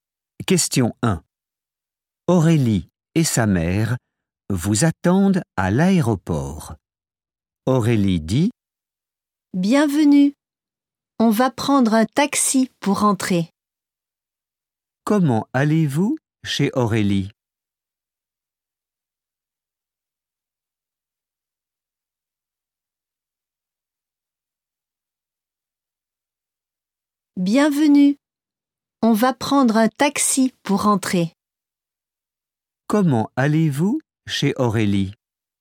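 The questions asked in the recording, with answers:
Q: Comment allez-vous chez Aurélie?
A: En taxi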